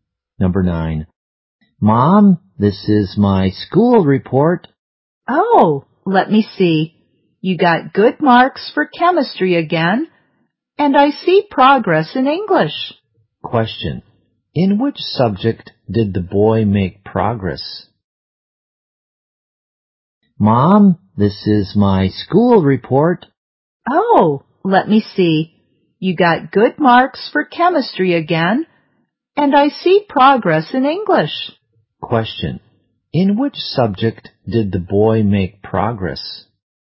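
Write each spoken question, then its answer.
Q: In which subject did the boy make progress?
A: English.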